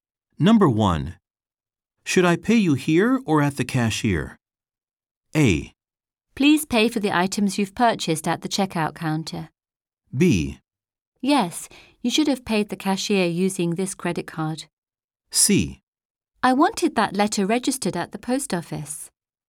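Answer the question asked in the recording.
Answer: A: Please pay for the items you've purchased at the checkout counter.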